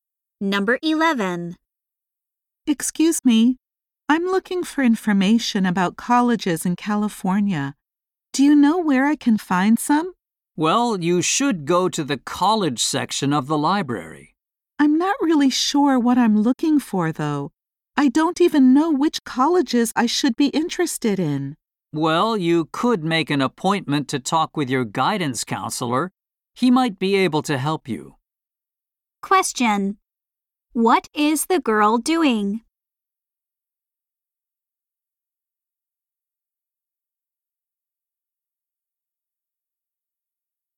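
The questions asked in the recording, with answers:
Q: What is the girl doing?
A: Looking for information about colleges in California.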